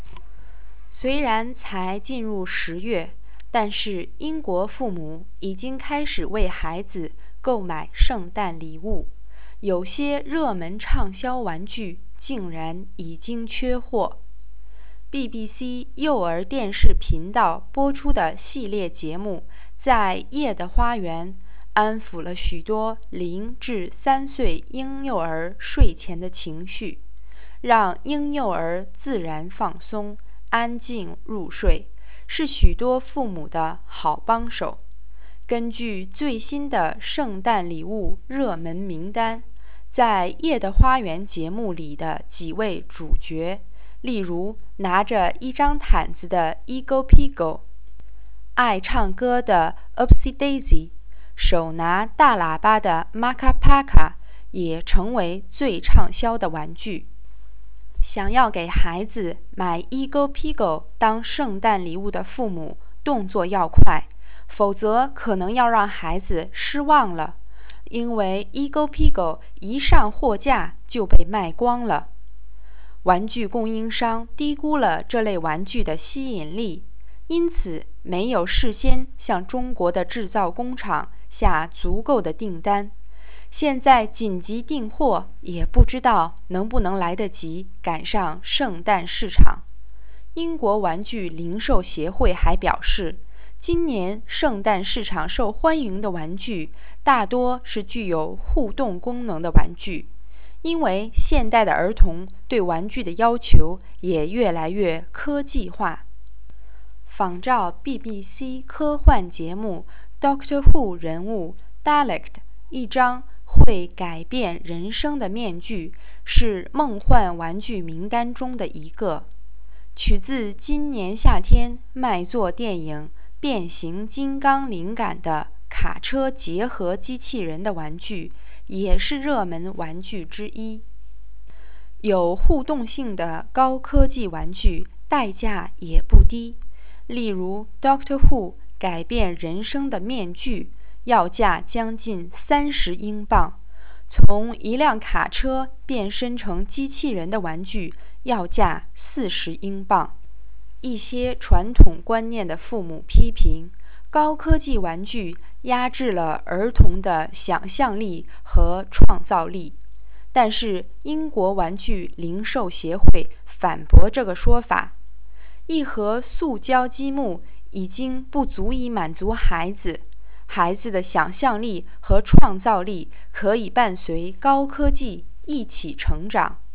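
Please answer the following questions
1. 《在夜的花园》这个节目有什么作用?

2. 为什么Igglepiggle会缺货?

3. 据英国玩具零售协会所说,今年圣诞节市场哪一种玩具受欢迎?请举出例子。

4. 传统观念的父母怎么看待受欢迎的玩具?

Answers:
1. 安抚零至三岁婴幼儿睡前的情绪,让他们自然放松,安静入睡。
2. 玩具供应商低估了它的吸引力,没有事先向中国工厂下足够的订单,一上货架就被卖光了。
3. 具有互动功能的高科技玩具,例如仿照Doctor Who中Dalek的面具、卡车变身机器人的玩具。
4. 他们批评高科技玩具压制了儿童的想象力和创造力。

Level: 3rd Year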